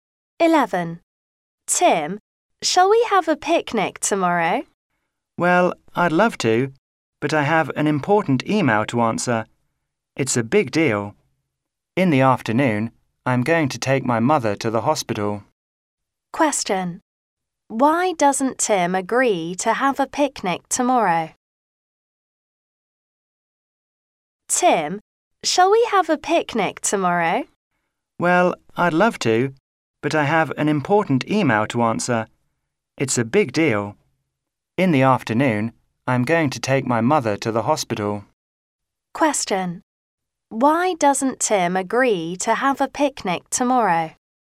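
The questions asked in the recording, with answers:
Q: Why doesn't Tim agree to have a picnic tomorrow?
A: He has an important email to answer and must take his mother to the hospital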